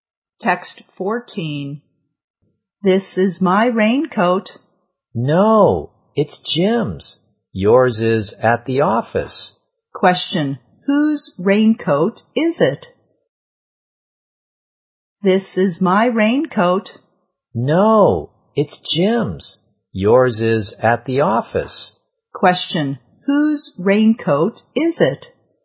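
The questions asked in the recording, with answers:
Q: Question, whose raincoat is it?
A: Jim's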